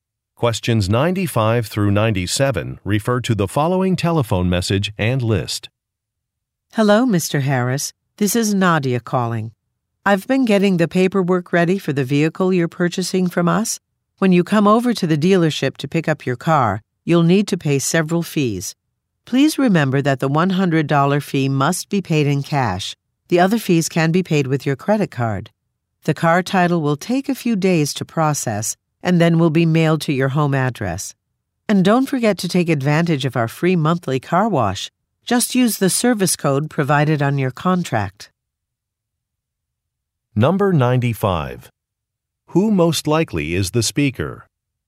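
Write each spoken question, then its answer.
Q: Who most likely is the speaker?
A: An employee at a car dealership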